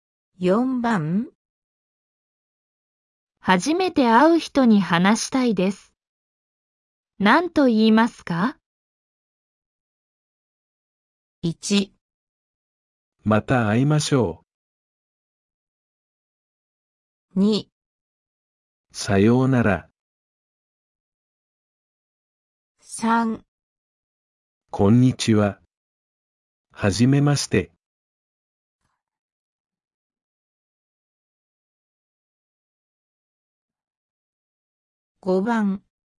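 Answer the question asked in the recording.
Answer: 3

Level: N5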